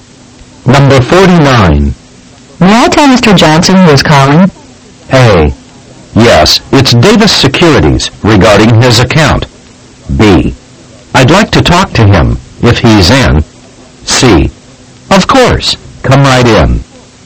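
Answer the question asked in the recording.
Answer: A: Yes, it's Davis Securities regarding his account.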